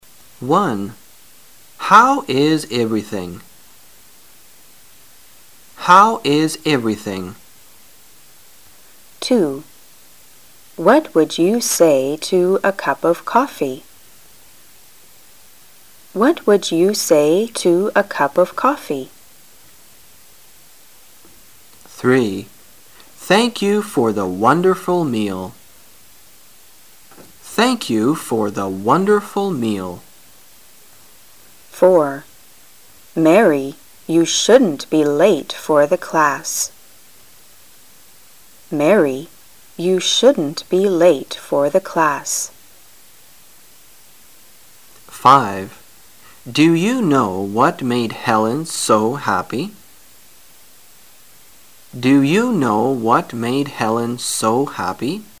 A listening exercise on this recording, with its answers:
Directions: This section is to test your ability to give proper answers to questions. There are 5 recorded dialogues in it. After each dialogue, there is a pause. The questions will be spoken two times, When you hear a question, you should decide on the correct answer fiom the 4 choices marked A), B), C) and D) given in your test paper. Then you should mark the corresponding letter on the Answer Sheet with a single line through the center.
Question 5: Do you know what made Helen so happy?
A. She just had a paper accepted for publication.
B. She has just failed in the exam.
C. I'm sorry I have to take an exam.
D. She has to study for an exam.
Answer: A. She just had a paper accepted for publication.

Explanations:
随意性询问。问题是"你知道是什么事使海伦如此高兴吗?",所以只有选项A符合题意。

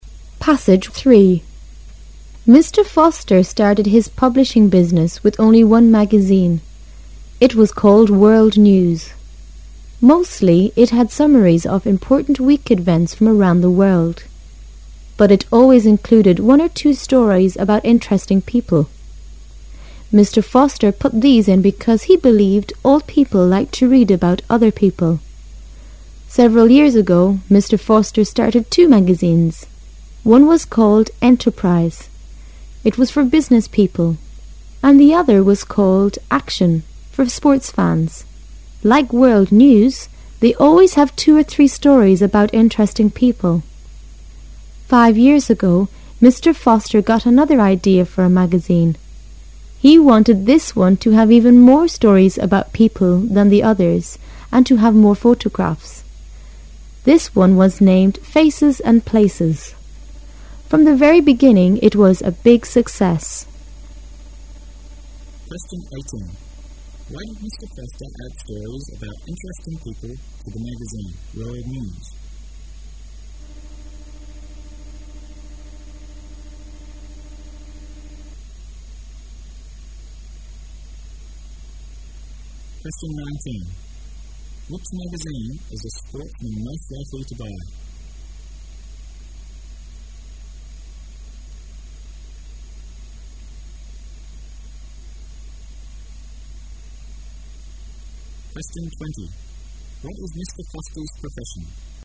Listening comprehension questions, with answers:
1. Which magazine is a sportsman most likely to buy?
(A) Action.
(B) World News.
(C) Enterprise.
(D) Faces and Places.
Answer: (A) Action.

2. What is Mr. Foster's profession?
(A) He is a sportsman.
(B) He is a photographer.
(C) He is an actor.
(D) He is a publisher.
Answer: (D) He is a publisher.

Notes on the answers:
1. 文中说"Action"是"for sports fans"的,故A为正确答案。
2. 文章第一句说"Mr.Foster started his publishing business with only one magazine."可知D为正确答案。

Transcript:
Foster started his publishing business with only' one magazine. It was called "World News". Mostly it had summaries of important week events from around the world. But it always included one or two stories about interesting people. Mr. Foster put these in because he believed all people like to read about other people. Several years ago, Mr. Foster started two magazines. One was called "Enterprise". It is for business people. And the other was called "Action", for sports fans. Like "World News", they always have two or three stories about interesting people. Foster got another idea for a magazine. He wanted this one to have even more stories about people than the others and to have more photographs. This one was named "Faces and Places". From the very beginning, it was a big success. Why did Mr. Foster add stories about interesting people to the magazine "World News"?

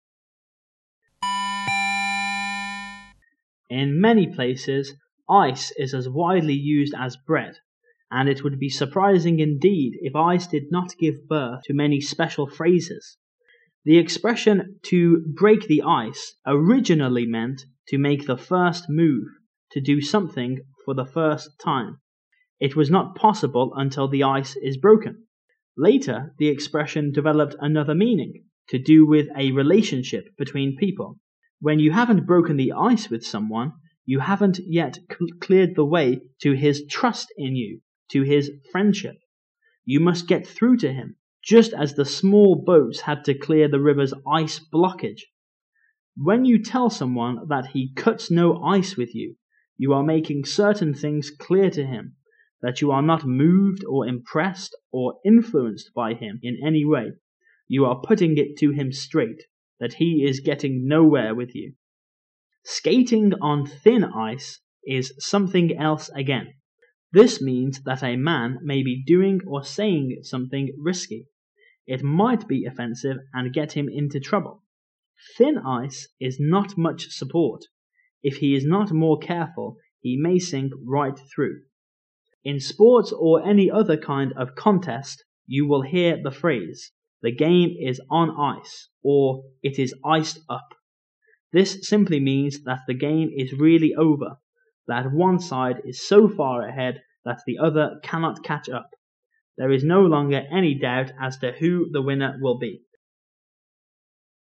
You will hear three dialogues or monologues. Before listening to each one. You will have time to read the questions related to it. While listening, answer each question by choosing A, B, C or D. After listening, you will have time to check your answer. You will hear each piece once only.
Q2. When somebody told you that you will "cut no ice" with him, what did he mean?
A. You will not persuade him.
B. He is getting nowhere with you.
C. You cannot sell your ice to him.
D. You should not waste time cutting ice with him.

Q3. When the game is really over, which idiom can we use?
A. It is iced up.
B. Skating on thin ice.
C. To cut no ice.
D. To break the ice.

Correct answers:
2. B. He is getting nowhere with you.
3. A. It is iced up.

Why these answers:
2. 本题答案对应于解释cut no ice这一短语的第三段。其中最后一句指出用这个短语的人的意思:...that he is getting nowhere with you,因此答案是[B]。
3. 独自中涉及game的是最后一段,这一段是对The game is on ice和his iced up两个与ice有关的短语的说明,因此本题答案无疑是[A]。

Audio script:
[听力原文]14-16 In many places, ice is as widely used as bread, and it would be surprising indeed if ice did not give birth to many special phrases. The expression, "to break the ice", meant, to make your first move, to do something for the first time; it was not possible until the ice was broken. Later, the expression developed another meaning, covering a relationship between people. When you have not broken the ice with someone, you have not yet cleared the. way to his trust in you, to his friendship, You must get through to him, just as the small boats had to clear the river's ice jam. When you tell someone that he "cuts no ice" with you, you are making certain things clear to him — that you are not moved or impressed or influenced by him in any way. You are putting it to him straight — that he is getting nowhere with you. "Skating on thin ice" is something else again. This means that a man may be doing or saying some- thing risky. It might be offensive and get him into trouble. Thin ice is not much support; if he is not more careful, he may sink right through. In sports or any other kind of contest, you will hear the phrase, "The game is on ice" or "It is iced up". This simply means that the game is really over, that one side is so far ahead that the other cannot catch up. There is no longer any doubt as who the winner will be.

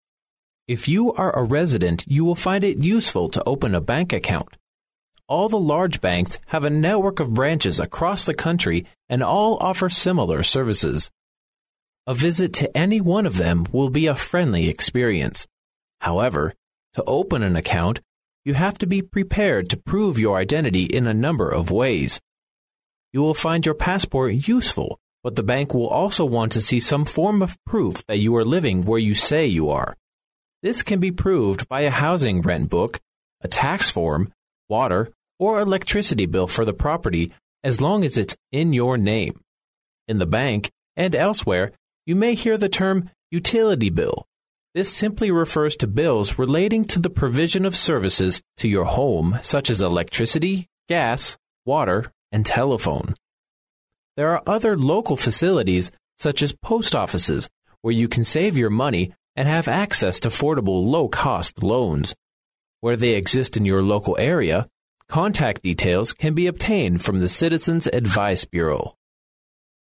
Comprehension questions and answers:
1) In order to open a bank account, you need to produce ______ in addition to your passport.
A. a library card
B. a registration form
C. a telephone bill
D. a receipt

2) Which of the following might NOT be included in the 'utility bill'?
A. Rent.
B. Gas.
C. Water.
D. Telephone.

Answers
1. C. a telephone bill
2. A. Rent.

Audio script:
[听力原文] If you are a resident you will find it useful to open a bank account. All the large banks have a network of branches across the country and all offer similar services. A visit to any one of them will be a friendly experience. However, to open an account, you have to be prepared to prove your identity in a number of ways. You will find your passport useful but the bank will also want to see some form of proof that you are living where you say you are. This can be proved by a housing rent book, a tax form, water or electricity bill for the property, as long as it's in your name. In the bank, and elsewhere, you may hear the term ' utility bill'-this simply refers to bills relating to the provision of services to your home such as electricity, gas, water and telephone. There are other local facilities such as post offices where you can save your money and have access to affordable low cost loans. Where they exist in your local area, contact details can be obtained from the Citizen's Advice Bureau.

